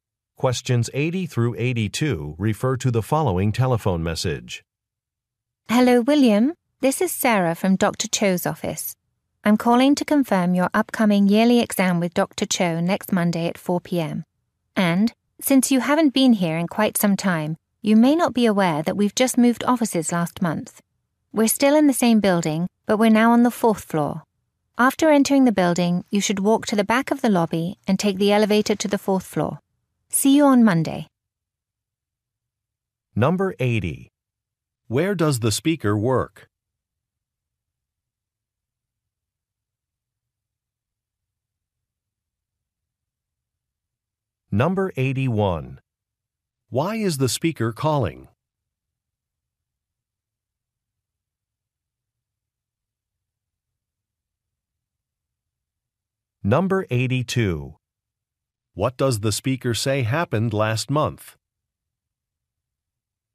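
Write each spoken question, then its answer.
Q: Where does the speaker work?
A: At a doctor's office

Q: Why is the speaker calling?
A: To confirm an appointment

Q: What does the speaker say happened last month?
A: The office moved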